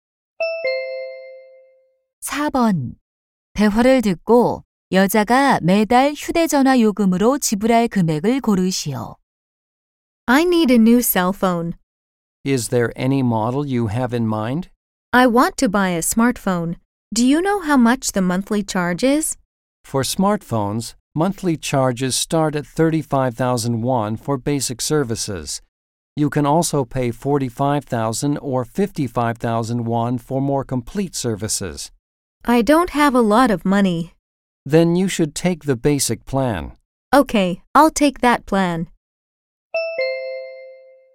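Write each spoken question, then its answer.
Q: 대화를 듣고 여자가 매달 휴대전화 요금으로 지불할 금액을 고르시오.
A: 35,000원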